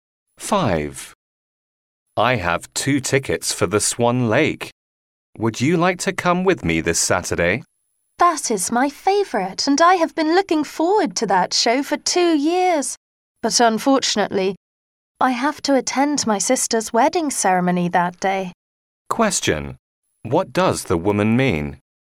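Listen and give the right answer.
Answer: She can't go to the show with him because of her sister's wedding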